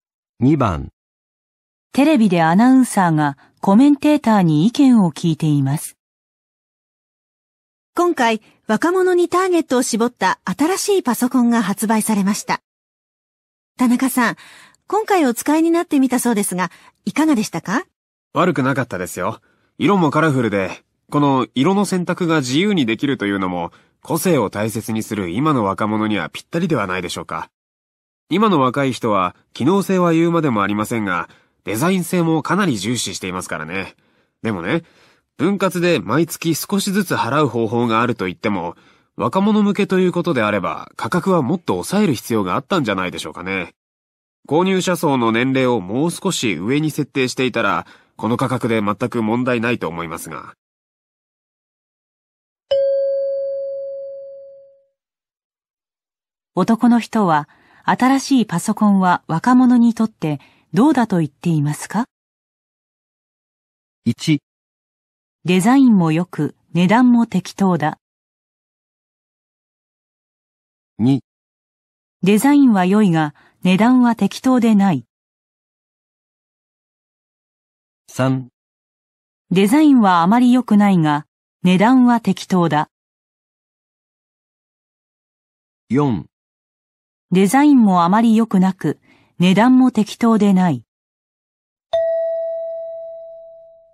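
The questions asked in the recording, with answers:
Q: 男の人は、新しいパソコンは若者にとってどうだと言っていますか?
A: 2: デザインは良いが、値段は適当でない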